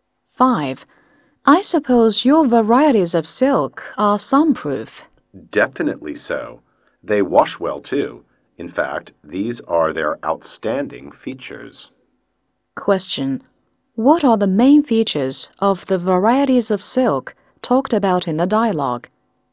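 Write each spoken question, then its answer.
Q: What are the main features of the varieties of silk talked about in the dialogue?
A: They are sunproof and wash well.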